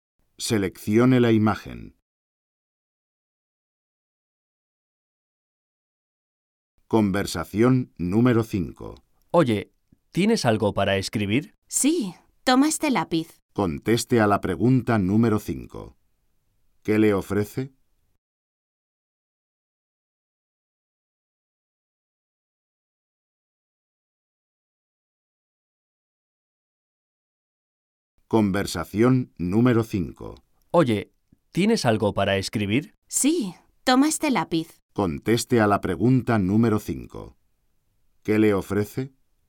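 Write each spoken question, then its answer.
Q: ¿Qué le ofrece?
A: Un lápiz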